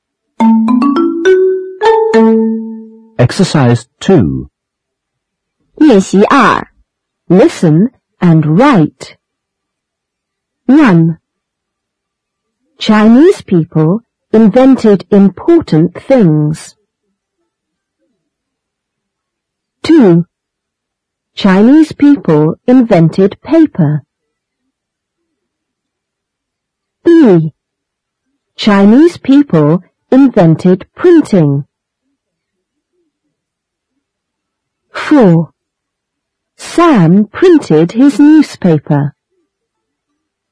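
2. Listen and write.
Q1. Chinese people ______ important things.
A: invented

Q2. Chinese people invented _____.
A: paper

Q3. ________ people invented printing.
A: Chinese

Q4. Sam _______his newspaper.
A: printed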